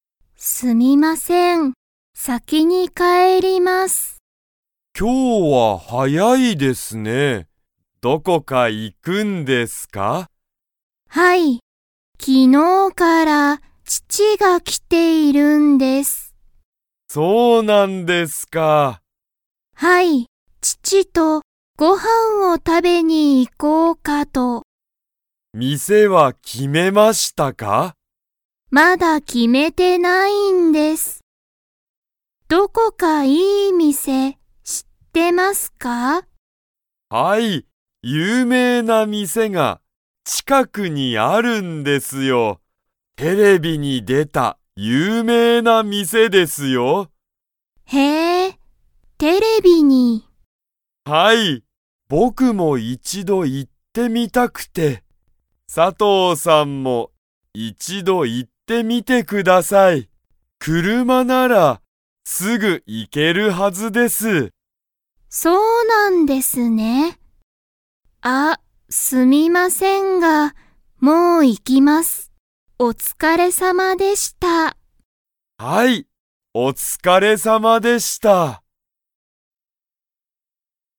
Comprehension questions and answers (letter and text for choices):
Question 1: 今日(きょう)、佐藤(さとう)さんは____とご飯(はん)を食(た)べに行(い)く。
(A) 鈴木(すずき)さん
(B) 友達(ともだち)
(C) 父(ちち)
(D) 母(はは)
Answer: (C) 父(ちち)

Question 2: 鈴木(すずき)さんは、その有名(ゆうめい)なお店(みせ)に行(い)ったことが____。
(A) ある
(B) ない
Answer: (B) ない

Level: Level 2